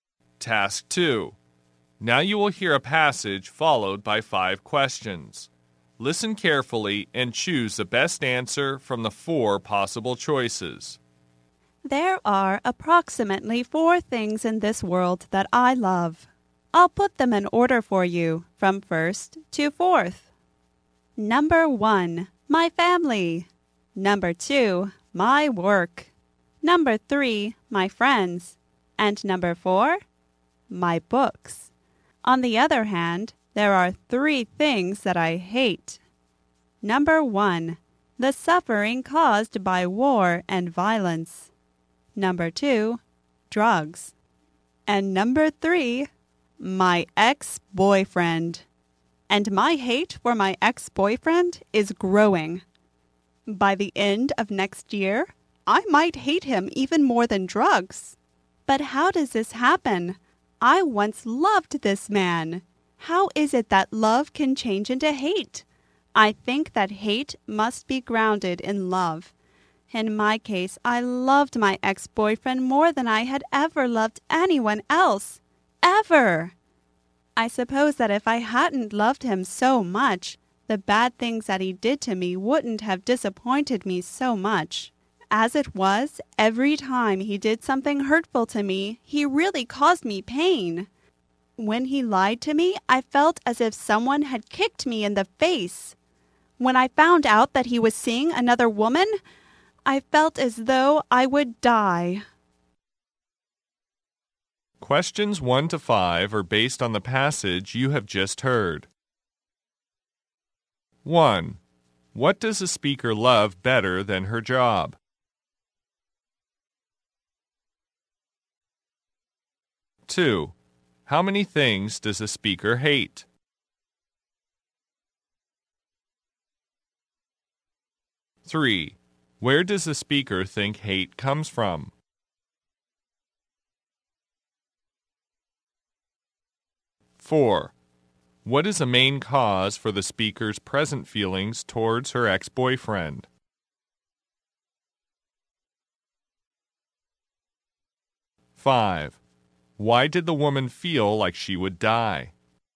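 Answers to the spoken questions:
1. Her family
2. Three
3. Love
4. She loved him so much that the bad things he did hurt her deeply
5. She found out he was seeing another woman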